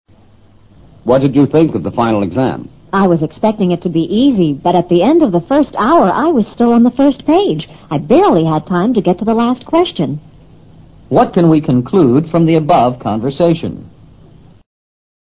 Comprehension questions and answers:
What can we conclude from the above conversation?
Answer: The exam was difficult for the woman.

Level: 世博高级听说